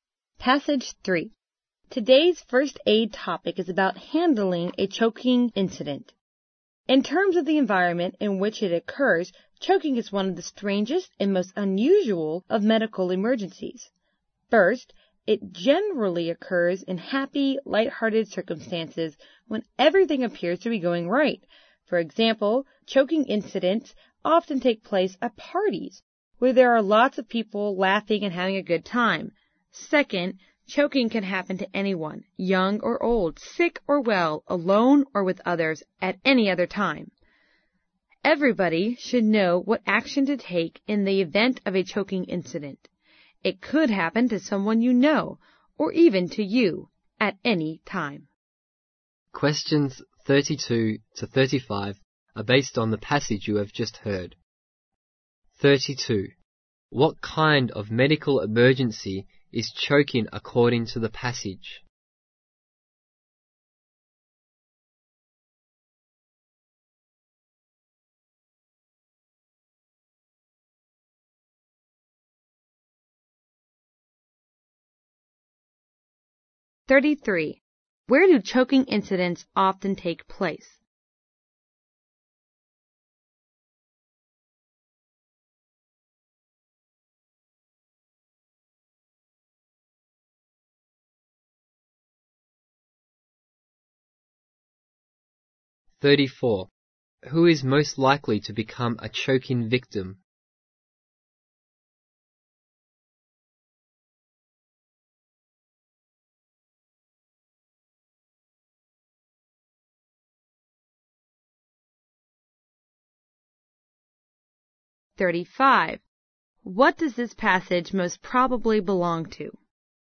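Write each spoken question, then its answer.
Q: What kind of medical emergency is choking according to the passage?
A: One of the strangest and most unusual

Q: Where do choking incidents often take place?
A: At parties

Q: Who is most likely to become a choking victim?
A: Anyone

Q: What does this passage most probably belong to?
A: A first aid program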